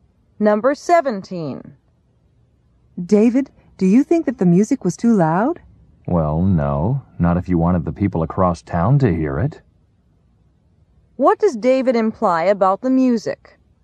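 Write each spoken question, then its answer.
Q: What does David imply about the music?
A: It was much too loud.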